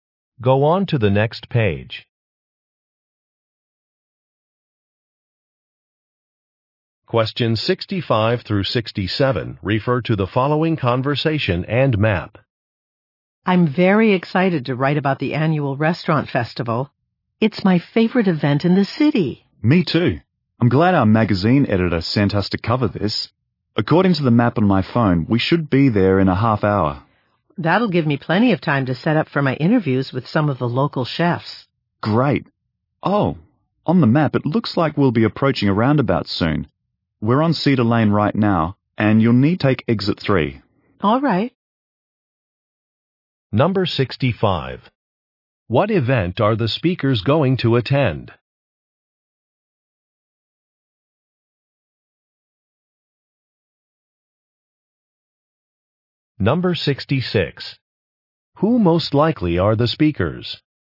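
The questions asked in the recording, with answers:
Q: What event are the speakers going to attend?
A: An annual restaurant festival

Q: Who most likely are the speakers?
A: Magazine writers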